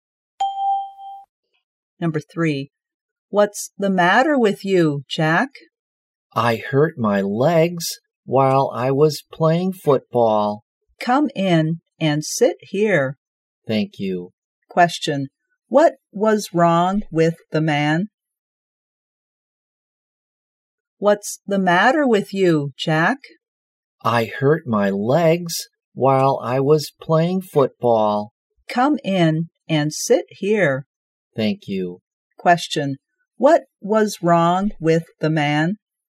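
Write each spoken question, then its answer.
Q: Question, what was wrong with the man?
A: He hurt his legs.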